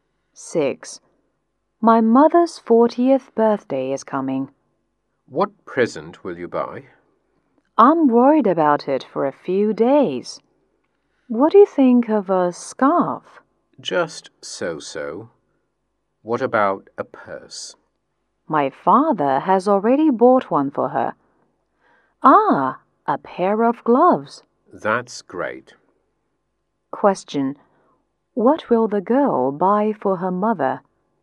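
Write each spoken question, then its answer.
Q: What will the girl buy for her mother?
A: A pair of gloves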